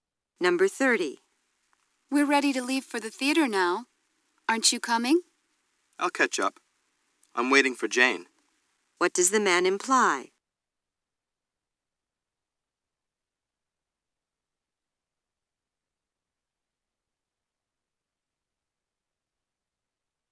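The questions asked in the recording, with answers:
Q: What does the man imply?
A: He will come later, after Jane arrives.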